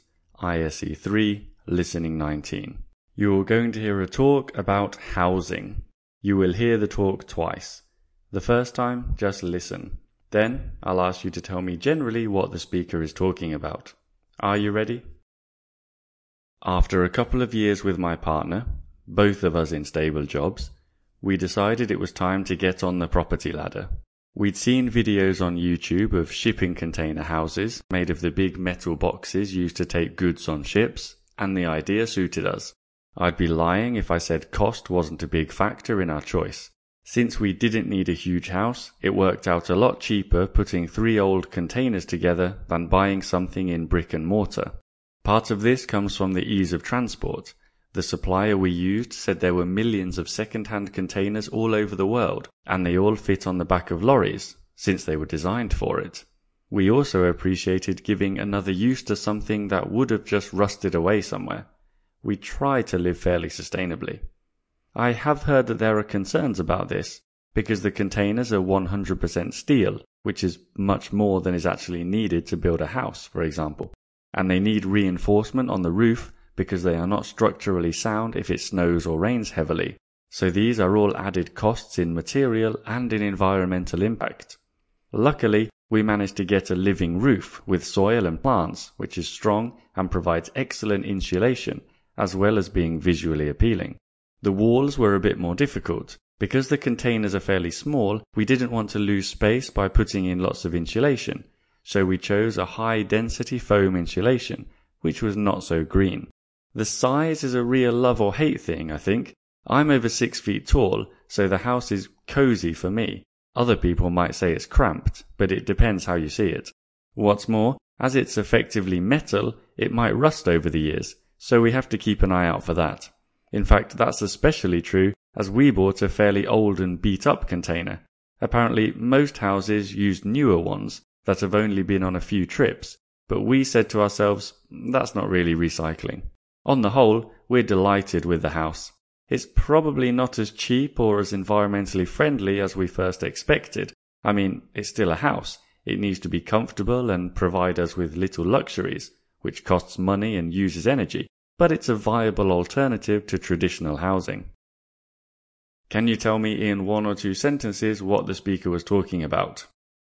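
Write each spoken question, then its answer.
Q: Can you tell me in one or two sentences what the speaker was talking about?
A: A man describing his experience of building and living in a house made from shipping containers, with its advantages and disadvantages.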